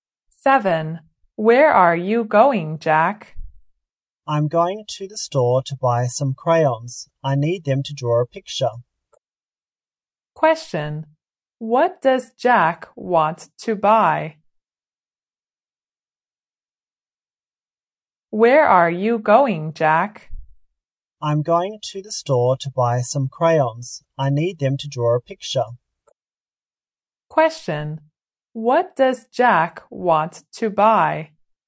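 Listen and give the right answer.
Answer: Some crayons.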